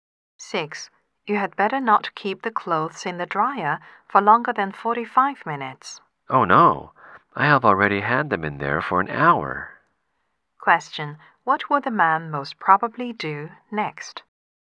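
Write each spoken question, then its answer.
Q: What will the man most probably do next?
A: Take the clothes out of the dryer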